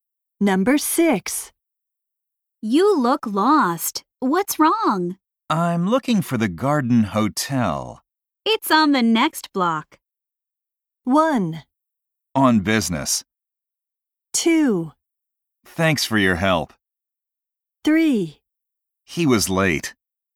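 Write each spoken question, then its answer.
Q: It's on the next block.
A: 2: Thanks for your help.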